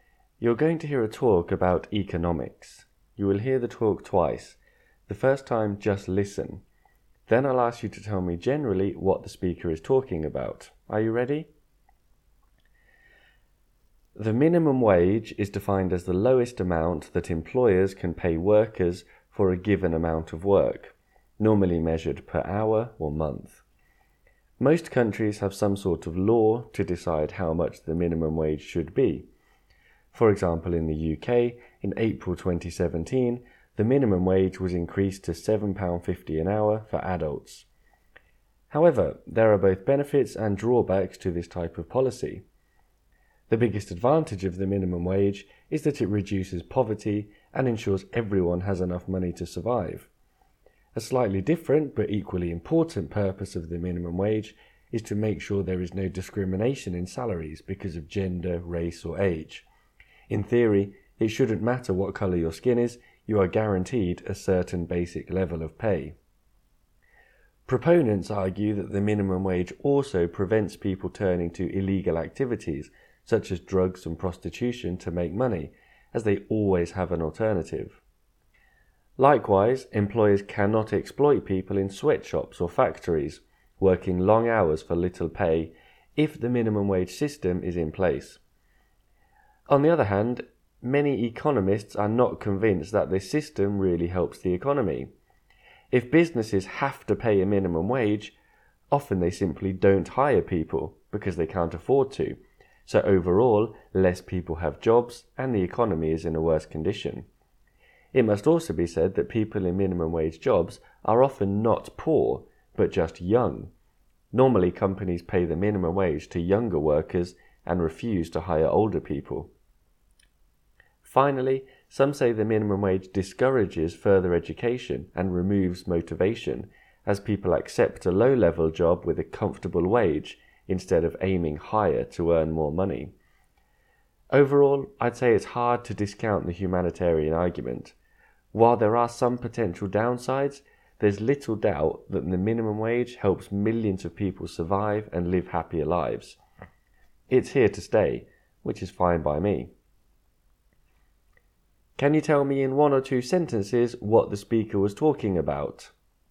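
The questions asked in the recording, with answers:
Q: Can you tell me in one or two sentences what the speaker was talking about?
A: The advantages and disadvantages of the minimum wage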